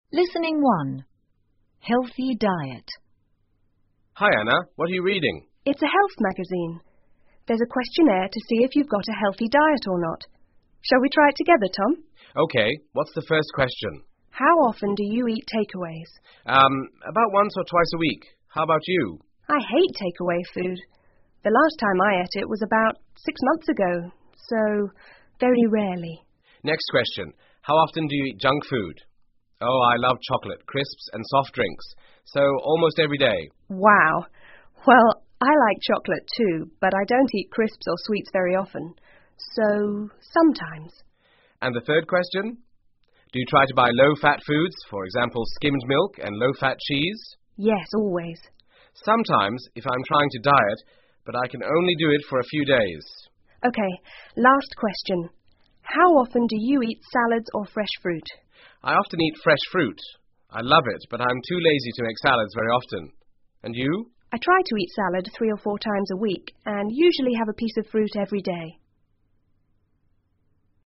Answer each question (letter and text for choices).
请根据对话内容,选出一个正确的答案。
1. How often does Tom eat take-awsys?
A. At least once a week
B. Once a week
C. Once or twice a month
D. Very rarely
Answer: A. At least once a week

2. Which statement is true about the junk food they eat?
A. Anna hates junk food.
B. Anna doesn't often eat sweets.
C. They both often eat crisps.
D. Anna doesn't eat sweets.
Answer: B. Anna doesn't often eat sweets.

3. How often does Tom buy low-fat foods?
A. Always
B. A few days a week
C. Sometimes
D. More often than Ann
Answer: C. Sometimes

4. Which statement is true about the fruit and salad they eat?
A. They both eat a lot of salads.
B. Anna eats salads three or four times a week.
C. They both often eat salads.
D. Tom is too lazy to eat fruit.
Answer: B. Anna eats salads three or four times a week.

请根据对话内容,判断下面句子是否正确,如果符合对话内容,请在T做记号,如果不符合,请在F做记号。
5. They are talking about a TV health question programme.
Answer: F

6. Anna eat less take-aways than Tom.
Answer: T

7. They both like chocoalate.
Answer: T

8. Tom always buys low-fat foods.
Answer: F

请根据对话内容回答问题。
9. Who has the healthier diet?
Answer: Anna

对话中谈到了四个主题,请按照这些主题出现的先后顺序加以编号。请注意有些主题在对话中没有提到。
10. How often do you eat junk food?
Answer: 2

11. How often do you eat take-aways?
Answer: 1

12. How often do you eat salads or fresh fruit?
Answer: 4

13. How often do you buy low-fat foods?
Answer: 3

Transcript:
Tom:Hi,Anna!What are you reading?
Anna:It's a health magazine.There's a questionnaire to see if you've got a healthy diet or not. Shall we try it together, Tom?
T:OK.What's the first question?
A:How often do you eat take-always?
T:Urm,about once or twice a week. How about you?
A:I hate take-away food. The last time I ate it was about six months ago...so...very rarely.
Oh,I love chocolate, crisps and soft drinks.So,almost every day.
A:Wow.Well,I like chocolate too,but I don't eat crisps or sweets very often. So...sometimes.
T:And the third question?Do you try to but low-fat foods,for example skimmed milk and low-fat cheese?
A:Yes,always.
T:Sometimes,if I'm trying to diet...but I can only do it for a few days.
A:OK.Last question.How often do you eat salads or fresh fruit?
T:I often eat fresh fruit.I love it but I'm too lazy to make salads very often. And you?
A:I try to eat salad three or four times a week and usually have a piece of fruit every day.